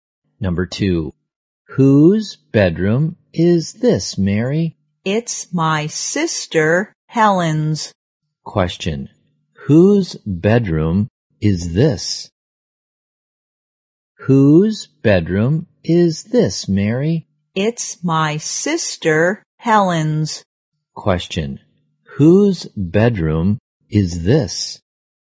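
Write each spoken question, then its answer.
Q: whose bedroom is this?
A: Helen's (Mary's sister's)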